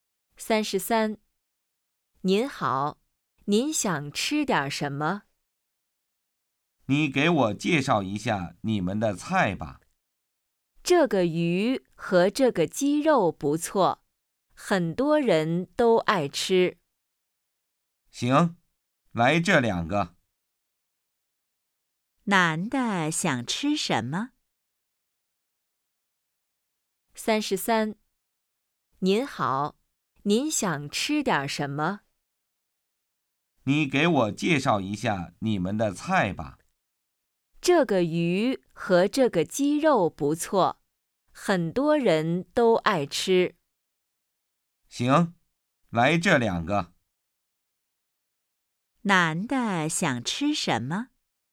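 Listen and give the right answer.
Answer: 鱼和鸡肉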